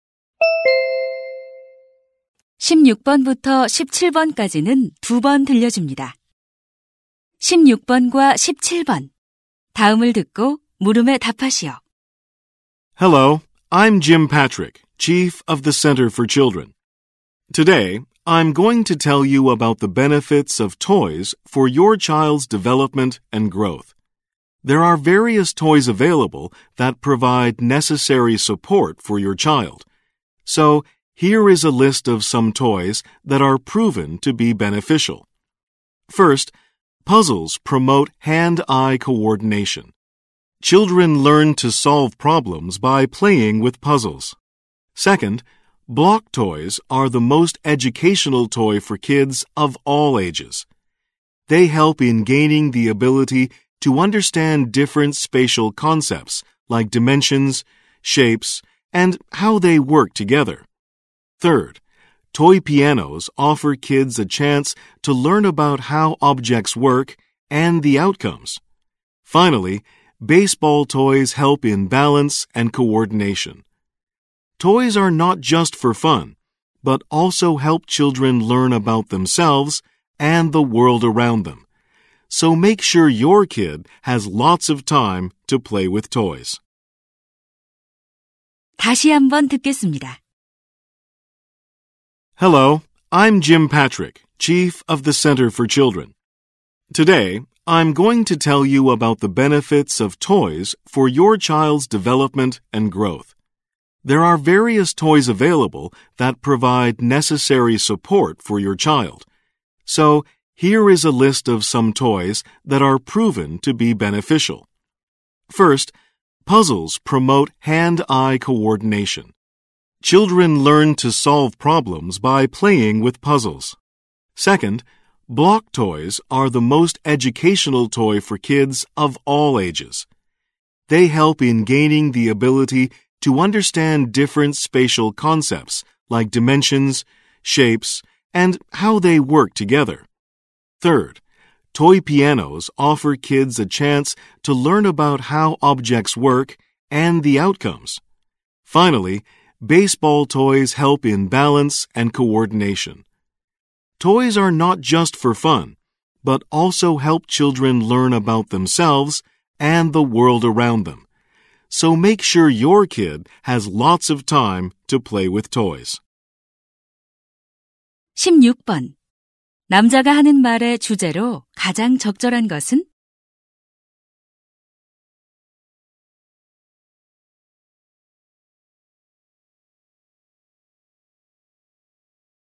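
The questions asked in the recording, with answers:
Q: 남자가 하는 말의 주제로 가장 적절한 것은?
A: 아이의 발달과 성장에 도움이 되는 장난감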